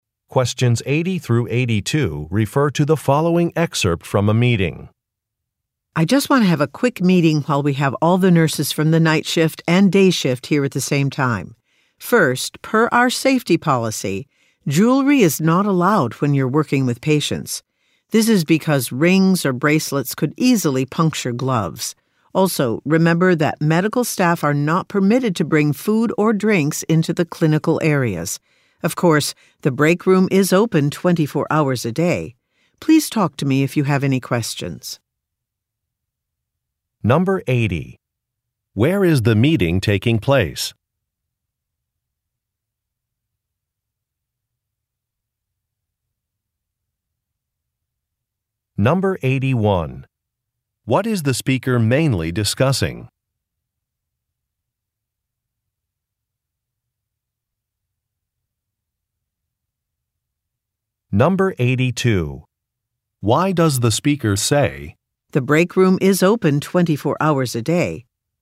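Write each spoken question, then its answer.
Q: Where is the meeting taking place?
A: At a hospital

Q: What is the speaker mainly discussing?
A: Workplace safety policies for nurses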